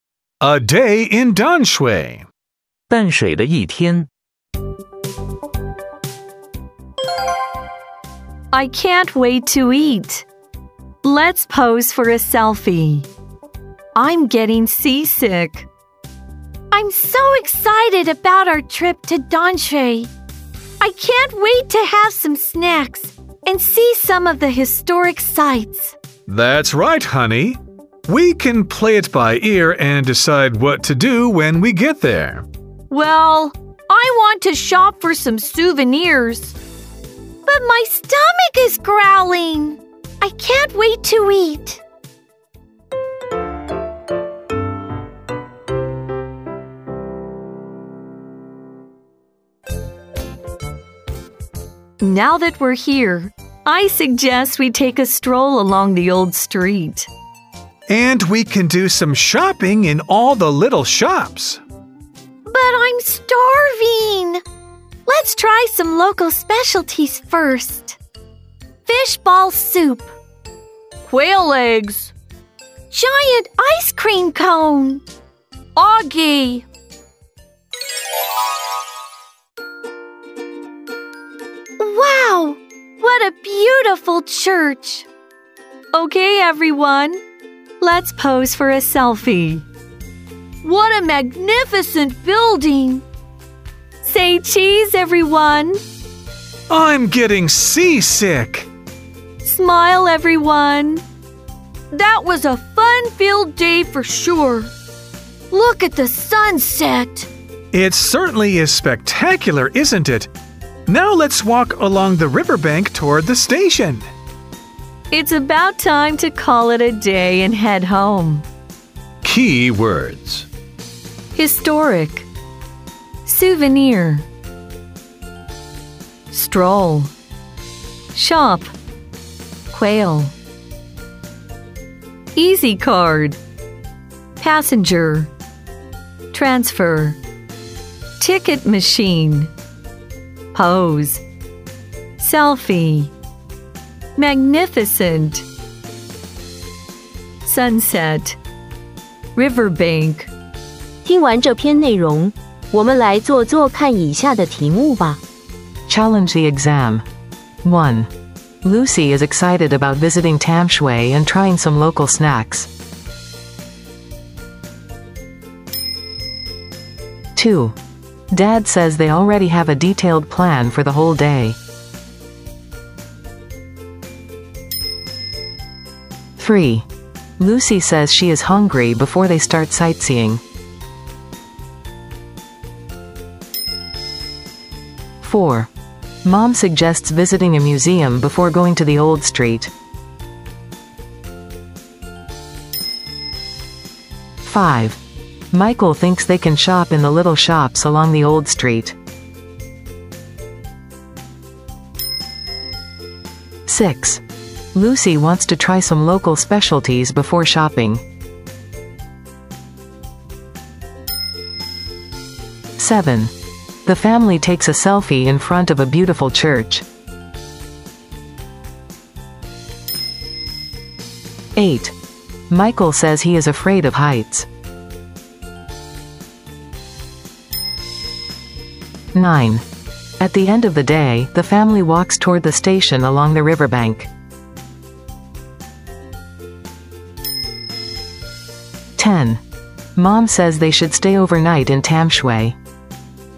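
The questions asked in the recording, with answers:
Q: Lucy is excited about visiting Tamshui and trying some local snacks.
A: True

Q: Dad says they already have a detailed plan for the whole day.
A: False

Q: Lucy says she is hungry before they start sightseeing.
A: True

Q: Mom suggests visiting a museum before going to the old street.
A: False

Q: Lucy wants to try some local specialties before shopping.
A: True

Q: The family takes a selfie in front of a beautiful church.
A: True

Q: Michael says he is afraid of heights.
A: False

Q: At the end of the day, the family walks toward the station along the riverbank.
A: True

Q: Mom says they should stay overnight in Tam Shui.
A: False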